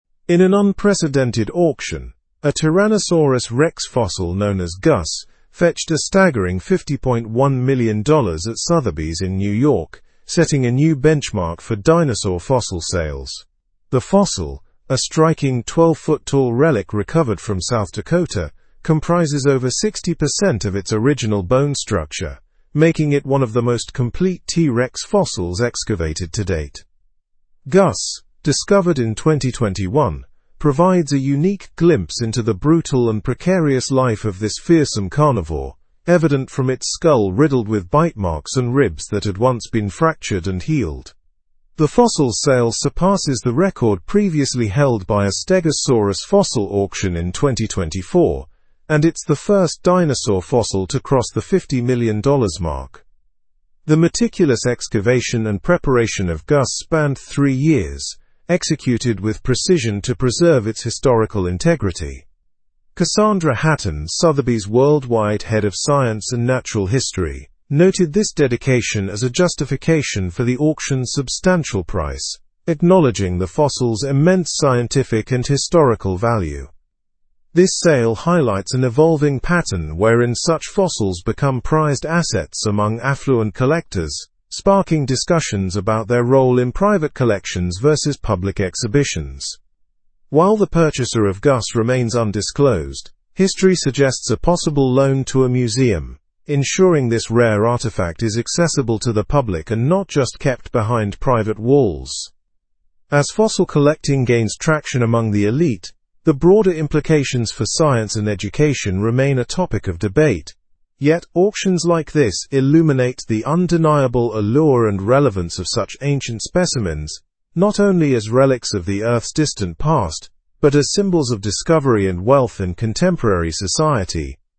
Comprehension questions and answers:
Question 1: What was the significance of Gus' auction?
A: Gus' auction was significant because it set a new benchmark for dinosaur fossil sales at $50.1 million.

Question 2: Where was Gus discovered?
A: Gus was discovered in South Dakota.

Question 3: What details were revealed about Gus' life through the fossil?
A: The fossil showed evidence of a brutal life with bite marks and healed rib fractures.

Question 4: How long did it take to excavate and prepare Gus?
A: It took three years to excavate and prepare Gus.

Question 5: Who is Cassandra Hatton in relation to the fossil?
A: Cassandra Hatton is Sotheby's worldwide head of science and natural history, who remarked on the auction.

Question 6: What implications does the sale have for public access to fossils?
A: The sale implies discussions about the access of such fossils in private collections versus museums.

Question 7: What broader conversations are prompted by fossil collecting among the wealthy?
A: Fossil collecting prompts conversations about its impacts on science and education, and the allure it holds.

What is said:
In an unprecedented auction, a Tyrannosaurus rex fossil known as Gus fetched a staggering $50.1 million at Sotheby's in New York, setting a new benchmark for dinosaur fossil sales. The fossil, a striking 12-foot-tall relic recovered from South Dakota, comprises over 60% of its original bone structure, making it one of the most complete T. rex fossils excavated to date.
Gus, discovered in 2021, provides a unique glimpse into the brutal and precarious life of this fearsome carnivore, evident from its skull riddled with bite marks and ribs that had once been fractured and healed. The fossil's sale surpasses the record previously held by a stegosaurus fossil auction in 2024, and it's the first dinosaur fossil to cross the $50 million mark.
The meticulous excavation and preparation of Gus spanned three years, executed with precision to preserve its historical integrity. Cassandra Hatton, Sotheby's worldwide head of science and natural history, noted this dedication as a justification for the auction's substantial price, acknowledging the fossil's immense scientific and historical value.
This sale highlights an evolving pattern wherein such fossils become prized assets among affluent collectors, sparking discussions about their role in private collections vs. public exhibitions. While the purchaser of Gus remains undisclosed, history suggests a possible loan to a museum, ensuring this rare artifact is accessible to the public and not just kept behind private walls.
As fossil collecting gains traction among the elite, the broader implications for science and education remain a topic of debate. Yet, auctions like this illuminate the undeniable allure and relevance of such ancient specimens, not only as relics of the earth's distant past but as symbols of discovery and wealth in contemporary society.

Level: Level 4